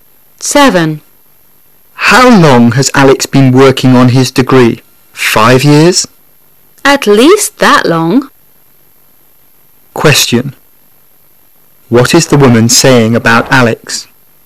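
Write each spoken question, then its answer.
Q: What is the woman saying about Alex?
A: Alex has been working on his degree for at least 5 years, maybe longer.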